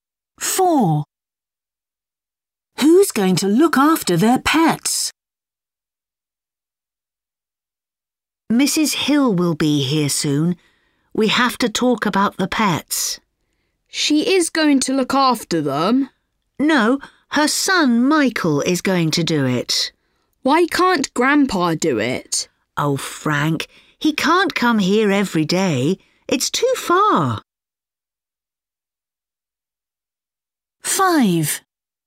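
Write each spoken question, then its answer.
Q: Who's going to look after their pets?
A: Michael, Mrs. Hill's son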